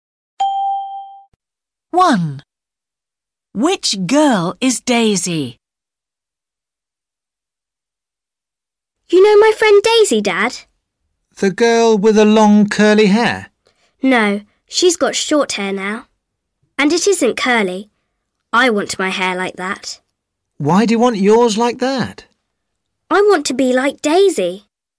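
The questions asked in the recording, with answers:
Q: Which girl is Daisy?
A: The girl with short, straight hair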